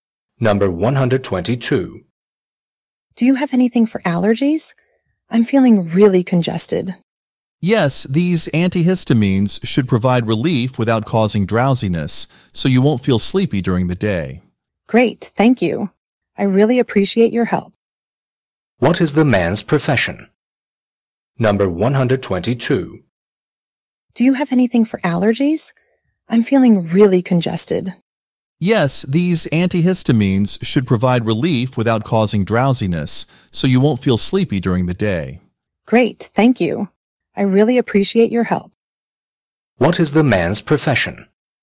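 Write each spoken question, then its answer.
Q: What is the man's profession?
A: Pharmacist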